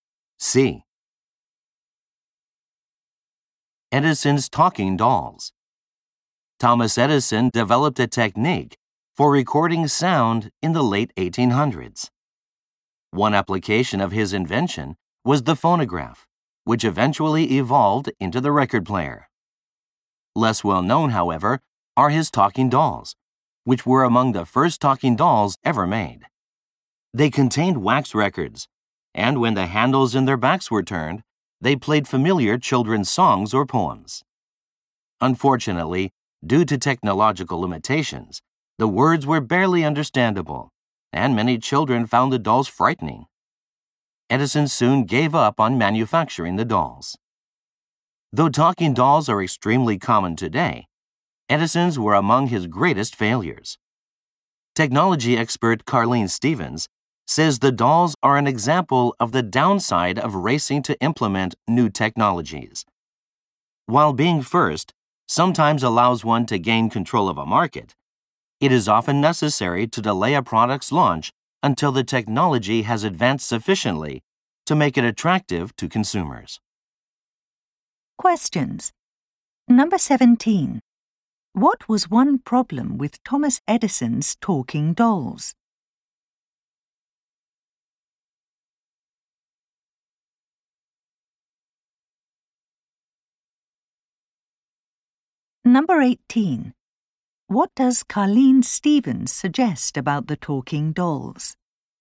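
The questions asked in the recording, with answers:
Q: What was one problem with Thomas Edison's talking dolls?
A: Their words were barely understandable, so many children found them frightening

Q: What does Carlene Stevens suggest about the talking dolls?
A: They were launched before the technology was advanced enough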